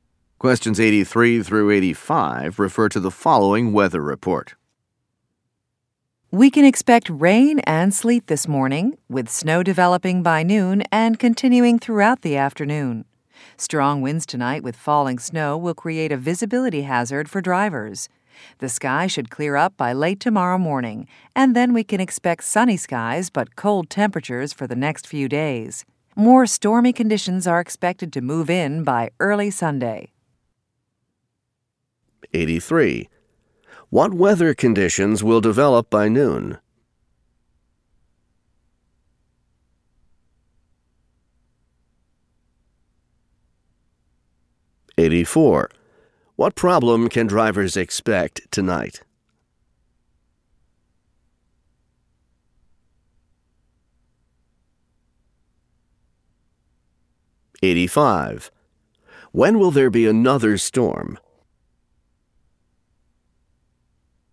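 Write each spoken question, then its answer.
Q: What weather conditions will develop by noon?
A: Snow

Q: What problem can drivers expect tonight?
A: Poor visibility

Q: When will there be another storm?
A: Early Sunday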